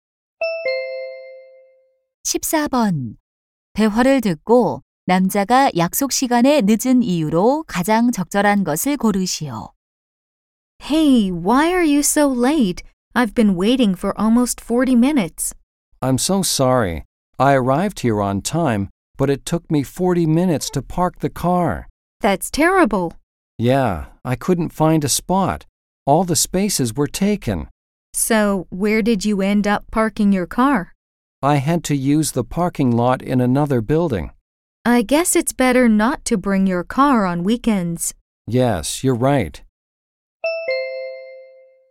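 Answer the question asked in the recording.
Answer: 주차할 곳을 찾지 못해서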